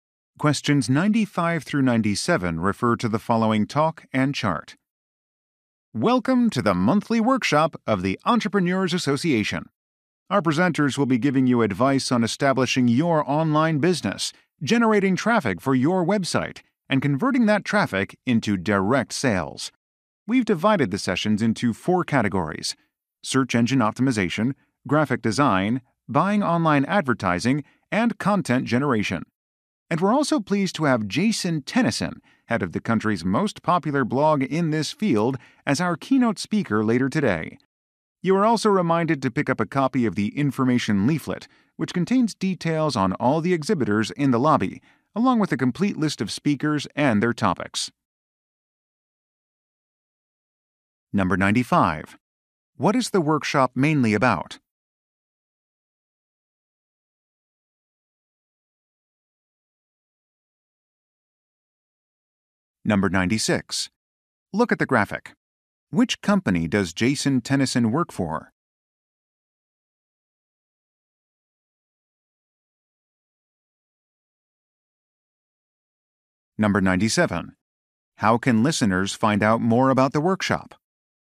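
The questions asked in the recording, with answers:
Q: What is the workshop mainly about?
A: Establishing an online business

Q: How can listeners find out more about the workshop?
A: By picking up an information leaflet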